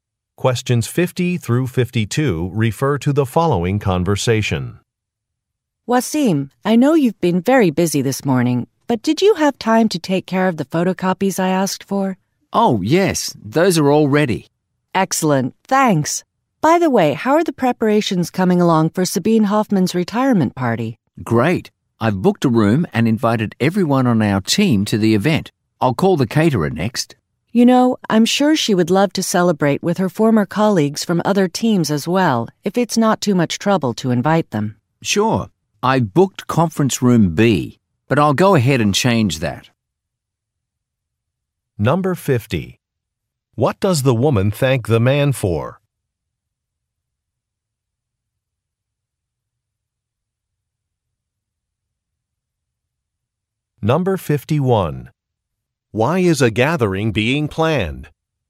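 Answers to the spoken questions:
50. Making photocopies
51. For a colleague's retirement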